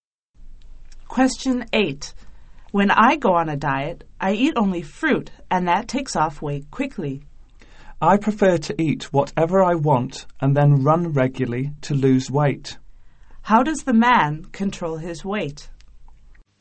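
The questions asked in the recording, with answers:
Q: How does the man control his weight?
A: He eats what he wants and runs regularly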